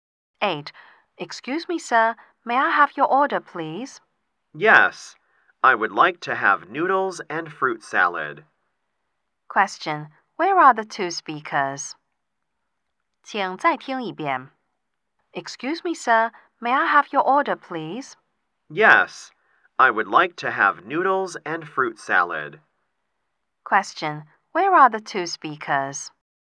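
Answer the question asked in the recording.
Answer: In a restaurant.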